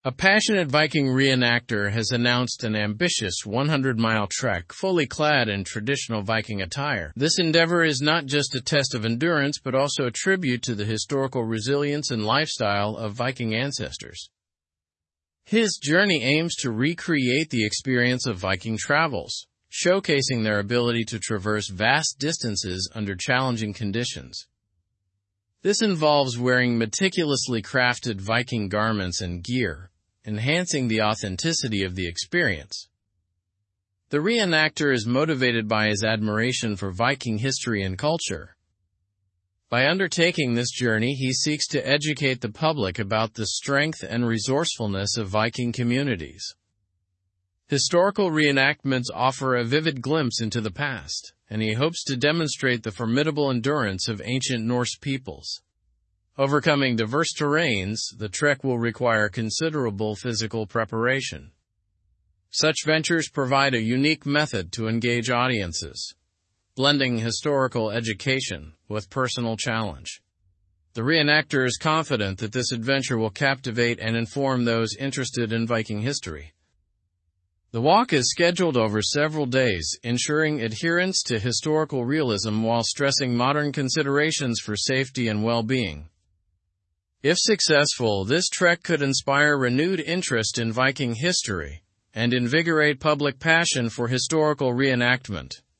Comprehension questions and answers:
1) What is the main goal of the Viking re-enactor's trek?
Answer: To recreate the experience of Viking travels and showcase their endurance.

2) How does the re-enactor plan to maintain authenticity during the trek?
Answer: By wearing meticulously crafted Viking garments and gear.

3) Why is the re-enactor undertaking this journey?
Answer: He is motivated by admiration for Viking history and seeks to educate the public.

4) What benefits do historical re-enactments provide according to the article?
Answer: They offer a vivid glimpse into the past and demonstrate historical endurance.

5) What kind of terrain is expected during the trek?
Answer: Diverse terrains that require considerable physical preparation.

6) How does the trek aim to engage audiences?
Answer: By blending historical education with a personal challenge.

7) What potential impact does the re-enactor hope the trek will have?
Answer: To inspire renewed interest in Viking history and invigorate public passion.

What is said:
A passionate Viking re-enactor has announced an ambitious 100-mile trek, fully clad in traditional Viking attire. This endeavor is not just a test of endurance but also a tribute to the historical resilience and lifestyle of Viking ancestors. His journey aims to recreate the experience of Viking travels, showcasing their ability to traverse vast distances under challenging conditions. This involves wearing meticulously crafted Viking garments and gear, enhancing the authenticity of the experience. The re-enactor is motivated by his admiration for Viking history and culture. By undertaking this journey, he seeks to educate the public about the strength and resourcefulness of Viking communities. Historical re-enactments offer a vivid glimpse into the past, and he hopes to demonstrate the formidable endurance of ancient Norse peoples. Overcoming diverse terrains, the trek will require considerable physical preparation. Such ventures provide a unique method to engage audiences, blending historical education with personal challenge. The re-enactor is confident that this adventure will captivate and inform those interested in Viking history. The walk is scheduled over several days, ensuring adherence to historical realism while stressing modern considerations for safety and well-being. If successful, this trek could inspire renewed interest in Viking history and invigorate public passion for historical re-enactment.

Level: Level 4